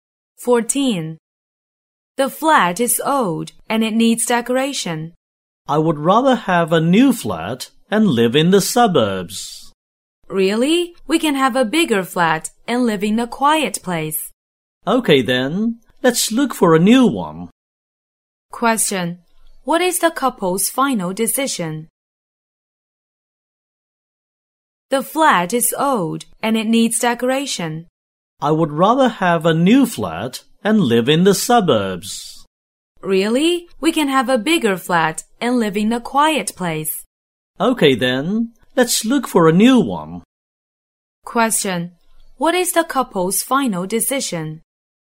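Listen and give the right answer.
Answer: To look for a new flat in the suburbs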